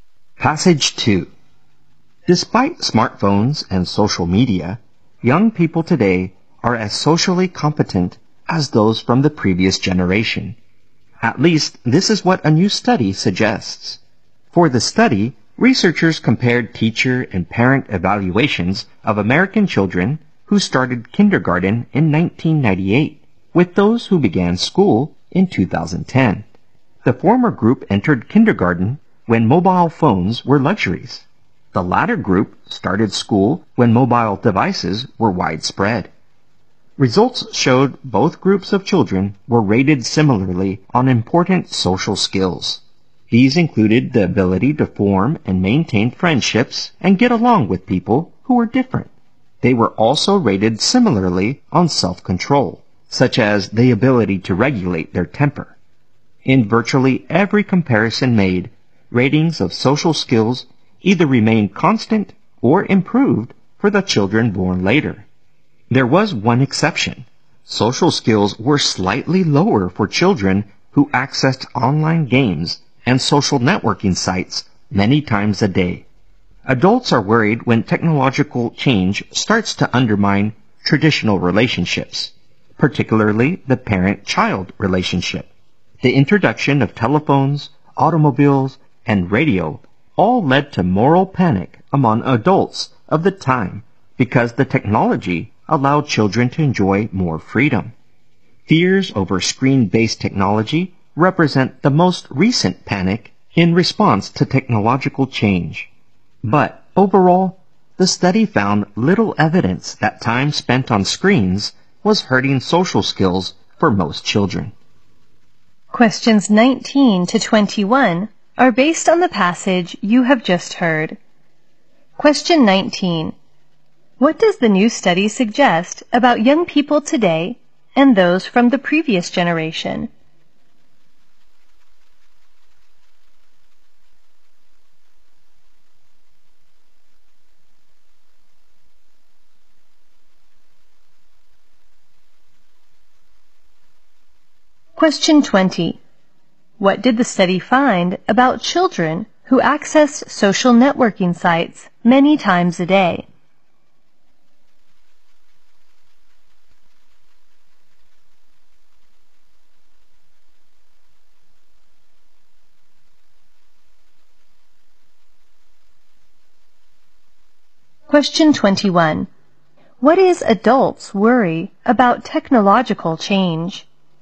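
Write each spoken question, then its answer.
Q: What does the new study suggest about young people today and those from the previous generation?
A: They are equally socially competent

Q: What did the study find about children who accessed social networking sites many times a day?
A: Their social skills were slightly lower

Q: What is adults' worry about technological change?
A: It may undermine traditional relationships, especially parent-child ones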